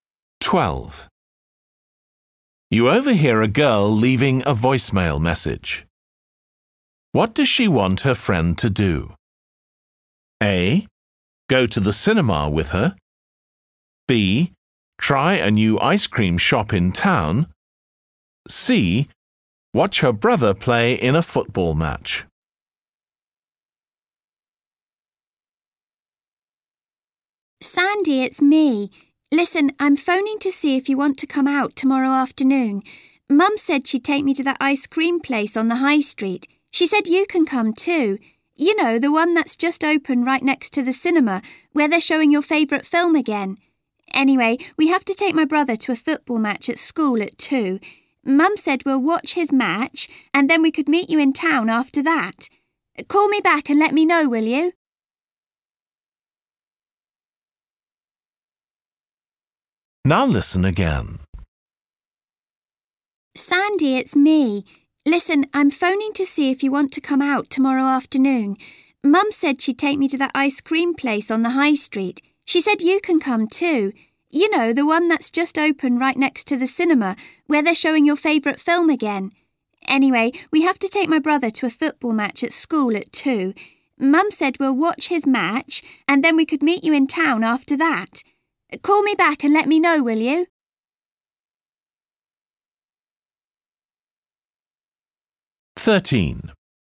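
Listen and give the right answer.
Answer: B: Try a new ice cream shop in town.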